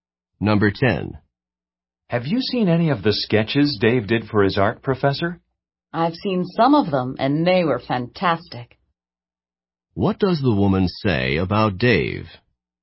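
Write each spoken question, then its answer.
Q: What does the woman say about Dave?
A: His sketches were fantastic.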